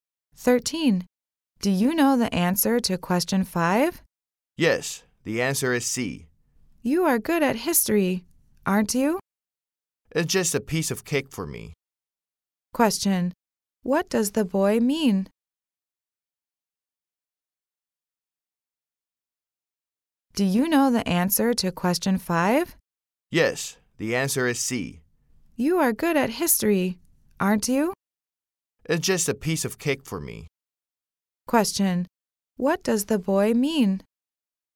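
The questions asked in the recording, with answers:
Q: Question. What does the boy mean?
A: History questions are very easy for him.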